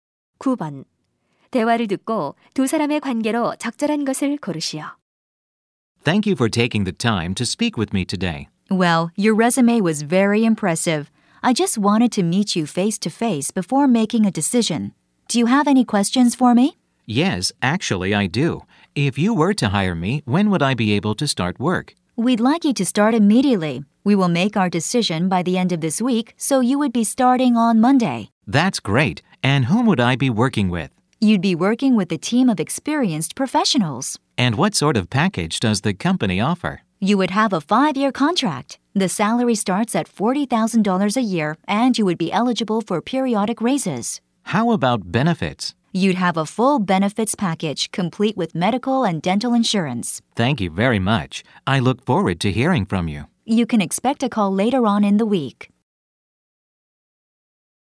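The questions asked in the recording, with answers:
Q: 대화를 듣고 두 사람의 관계로 적절한 것을 고르시오.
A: 면접관 - 구직자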